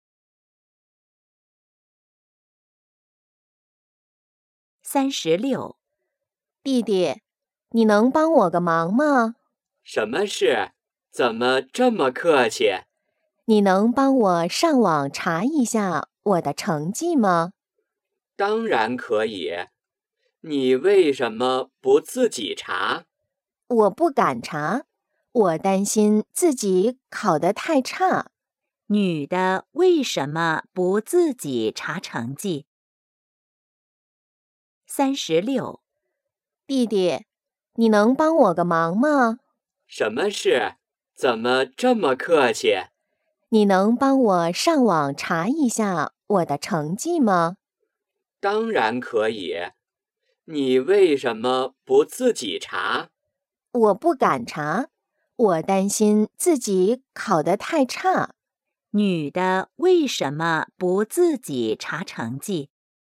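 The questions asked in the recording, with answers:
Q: 女的为什么不自己查成绩?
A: 担心自己考得太差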